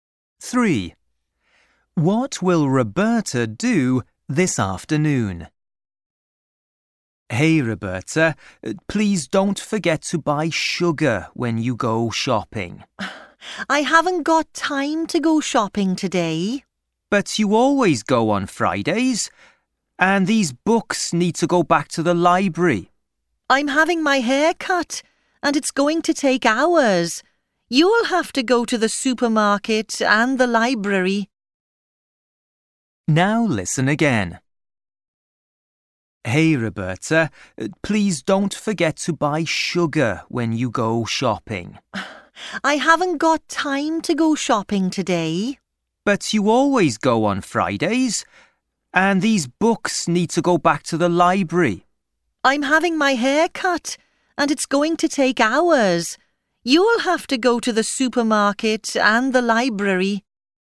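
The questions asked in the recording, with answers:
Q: What will Roberta do this afternoon?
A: have her hair cut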